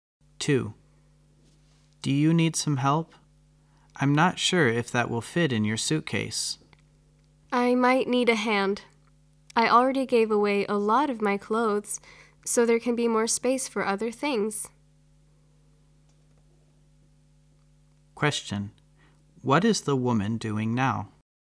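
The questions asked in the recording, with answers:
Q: What is the woman doing now?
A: Packing her suitcase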